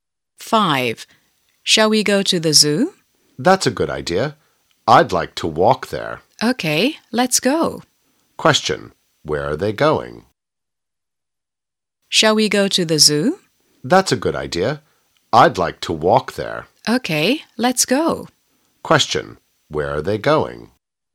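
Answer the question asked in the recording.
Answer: To the zoo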